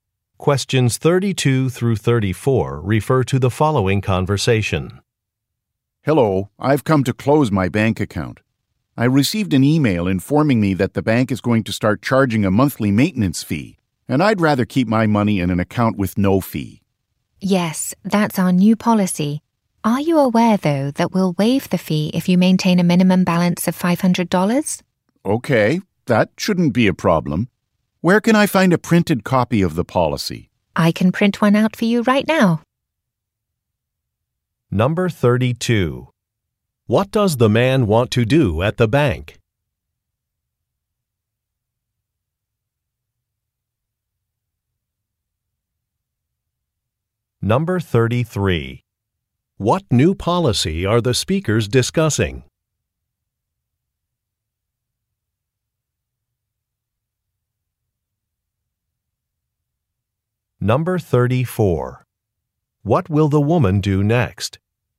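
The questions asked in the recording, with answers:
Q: What does the man want to do at the bank?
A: Close his bank account

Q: What new policy are the speakers discussing?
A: A monthly maintenance fee

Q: What will the woman do next?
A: Print a copy of the policy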